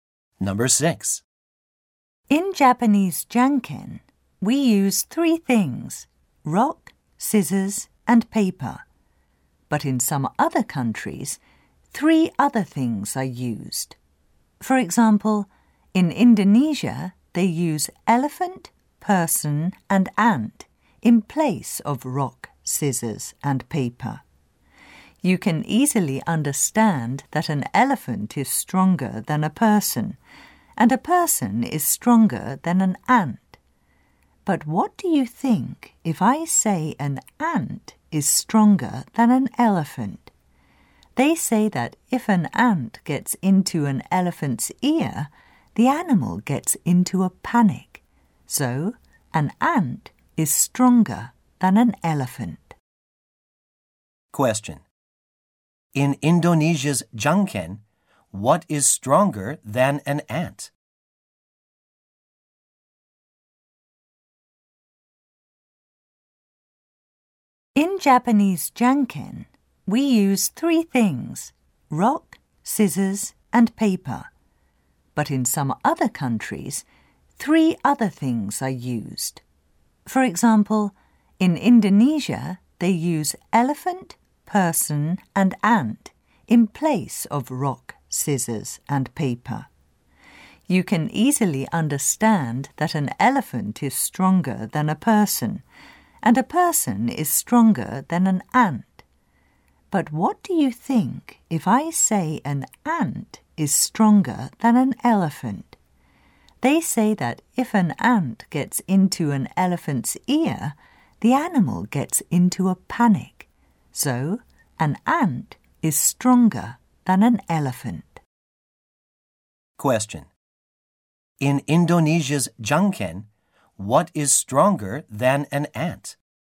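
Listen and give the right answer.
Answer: A person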